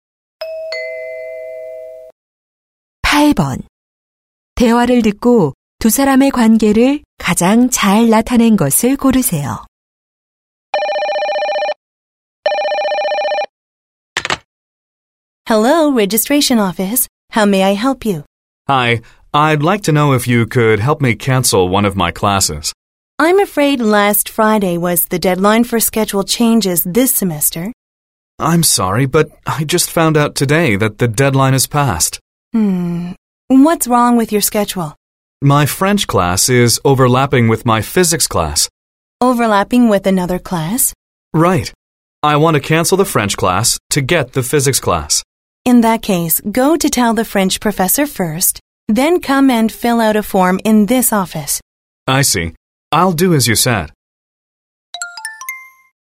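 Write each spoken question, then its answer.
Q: 대화를 듣고 두 사람의 관계를 가장 잘 나타낸 것을 고르세요.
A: 학적과 직원 - 학생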